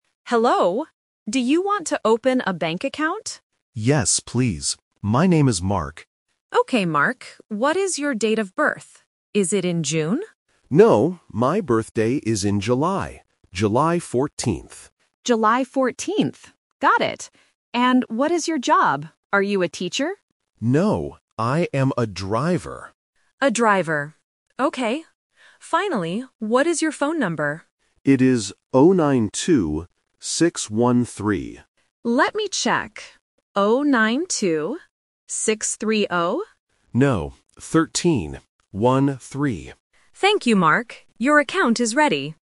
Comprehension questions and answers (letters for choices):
Listen to the conversation between a bank teller and a customer. Circle the correct answer for each question.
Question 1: When is Mark's birthday?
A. In June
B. In July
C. In August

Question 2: What is Mark's job?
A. A teacher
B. A driver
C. A guard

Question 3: What is Mark's phone number?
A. 092-613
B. 092-630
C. 092-650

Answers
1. B
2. B
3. A

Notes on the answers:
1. Mark states, "my birthday is in July." Option (A) In June is the trap because the teller asks if his birthday is in June, but he says "No." Option (C) In August is a plausible month but is never mentioned.
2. Mark says, "I am a driver." Option (A) A teacher is the trap because the teller guesses this job, but Mark corrects her. Option (C) A guard is not mentioned.
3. Mark says his phone number ends in "6-1-3" and repeats "One-three." Option (B) 092-630 is the trap because the teller mishears "13" as "30" (a typical A1 distractor). Option (C) 092-650 is not mentioned.

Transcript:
Teller: Hello. Do you want to open a bank account?
Mark: Yes, please. My name is Mark.
Teller: Okay, Mark. What is your date of birth? Is it in June?
Mark: No, my birthday is in July. July 14th.
Teller: July 14th. Got it. And what is your job? Are you a teacher?
Mark: No, I am a driver.
Teller: A driver. Okay. Finally, what is your phone number?